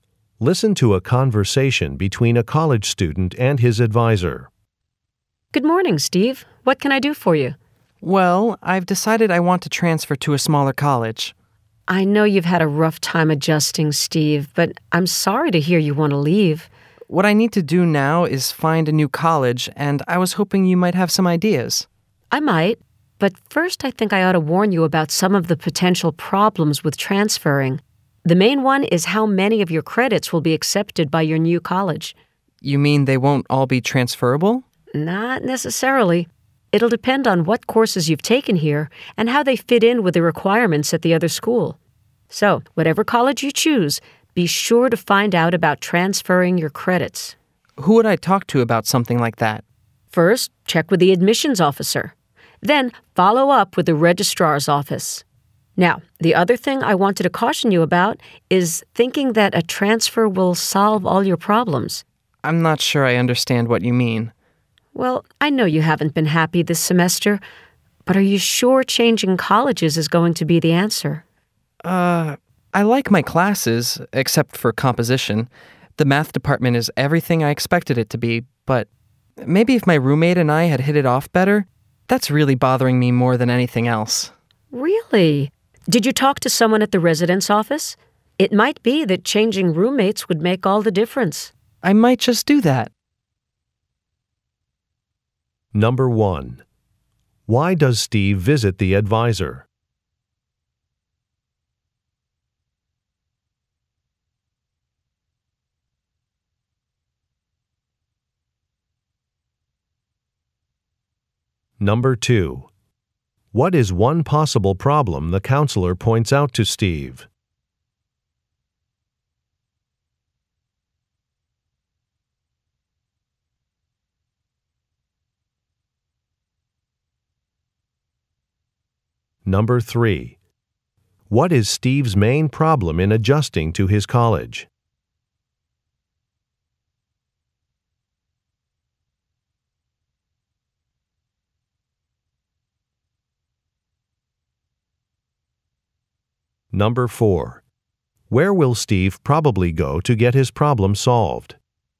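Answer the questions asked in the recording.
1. To get ideas about transferring to a smaller college.
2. Not all his credits may be accepted.
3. He doesn't get along with his roommate.
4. The residence office.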